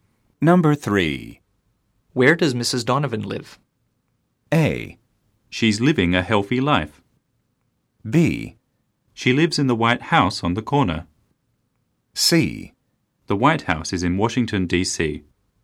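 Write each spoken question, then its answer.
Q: Where does Mrs. Donovan live?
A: B: She lives in the White House on the corner.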